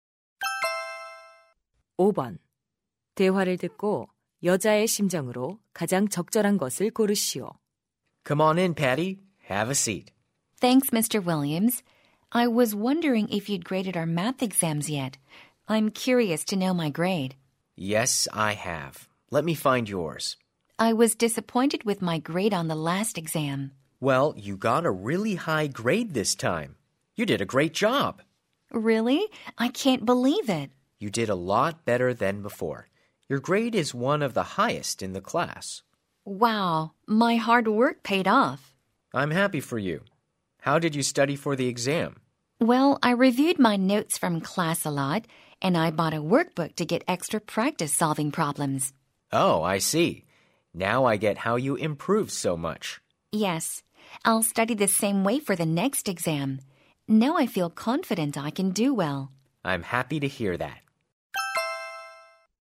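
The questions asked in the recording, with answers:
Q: 대화를 듣고 여자의 심정으로 가장 적절한 것을 고르시오.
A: 기쁘고 자신감 있는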